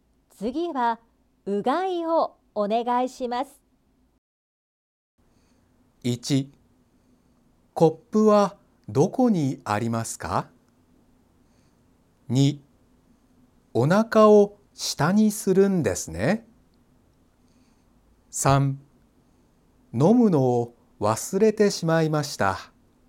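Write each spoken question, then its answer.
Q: 次はうがいをお願いします。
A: 1: コップはどこにありますか?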